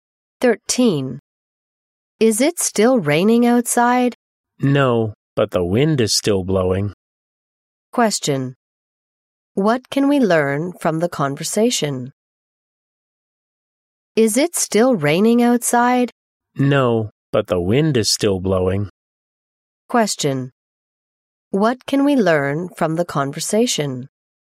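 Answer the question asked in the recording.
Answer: It has stopped raining but it is still windy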